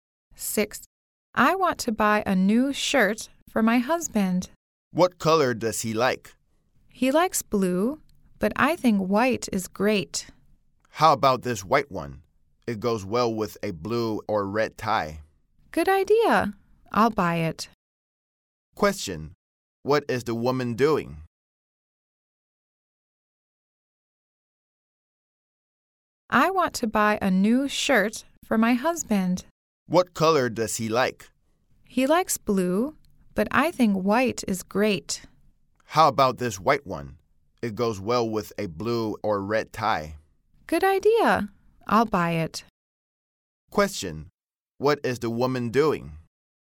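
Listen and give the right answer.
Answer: Buying a shirt for her husband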